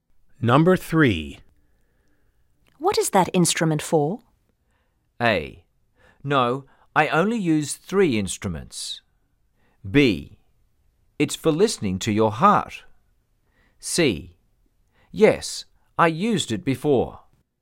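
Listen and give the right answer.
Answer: B: It's for listening to your heart.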